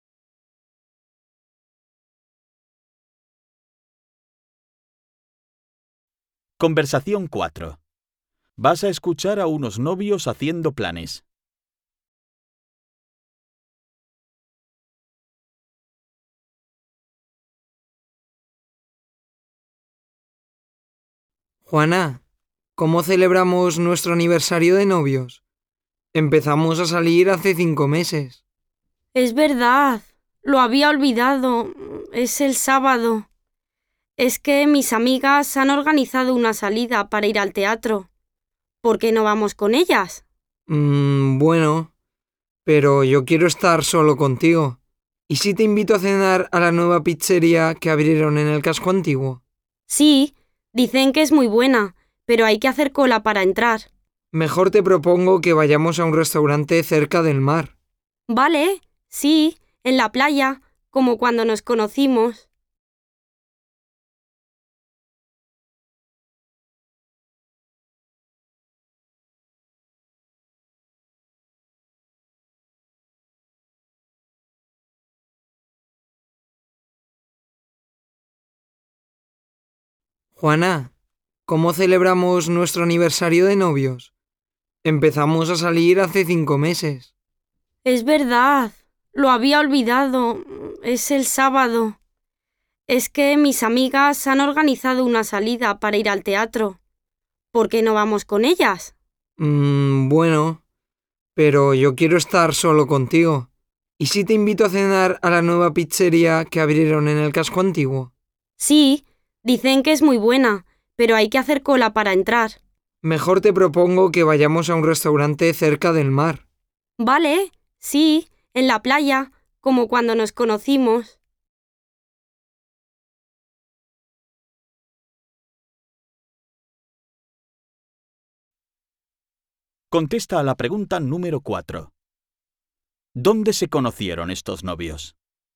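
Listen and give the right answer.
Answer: En la playa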